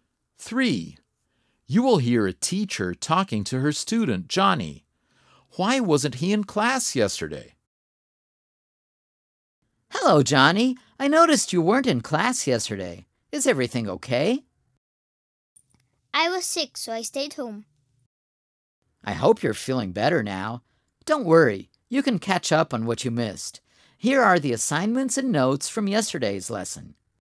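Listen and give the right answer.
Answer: He was sick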